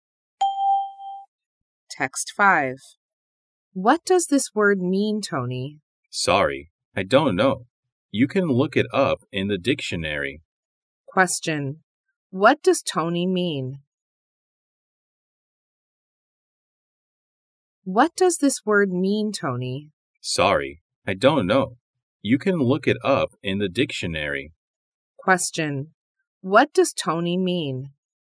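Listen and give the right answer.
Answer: Look it up in the dictionary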